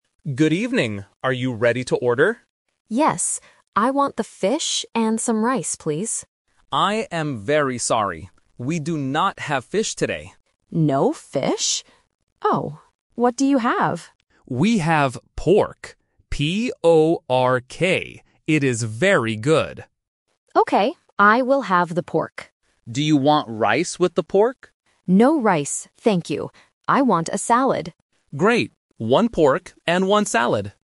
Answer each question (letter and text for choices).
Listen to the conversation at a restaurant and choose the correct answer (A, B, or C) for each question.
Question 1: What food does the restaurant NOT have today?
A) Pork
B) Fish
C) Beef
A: B) Fish

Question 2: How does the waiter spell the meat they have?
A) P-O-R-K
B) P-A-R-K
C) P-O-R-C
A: A) P-O-R-K

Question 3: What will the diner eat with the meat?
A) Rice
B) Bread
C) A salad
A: C) A salad

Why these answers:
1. The waiter clearly says, "We do not have fish today." Option (A) Pork is The Trap: pork is mentioned in the audio, but it is the food they do have. Option (C) Beef is a plausible meat but is not mentioned.
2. The waiter suggests a new meat and spells it very clearly: "P-O-R-K". Options (B) and (C) are distractors with incorrect spelling but similar pronunciation.
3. The diner changes her mind and says, "I want a salad." Option (A) Rice is The Trap: the diner asks for rice first, and the waiter asks "Do you want rice with the pork?", but she rejects it by saying "No rice, thank you." Option (B) Bread is not mentioned in the dialogue.

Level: A1